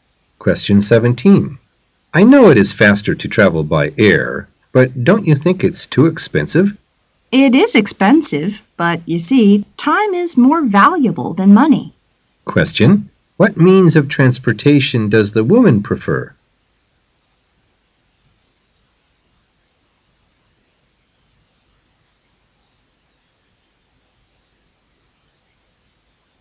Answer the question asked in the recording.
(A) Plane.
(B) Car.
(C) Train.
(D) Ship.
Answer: (A) Plane.

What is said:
[解析] M: I know it is faster to travel by air, but don't you think it's too expensive? W: It is expensive, but you see, time is more valuable than money. Q: What means of transportation does the woman prefer?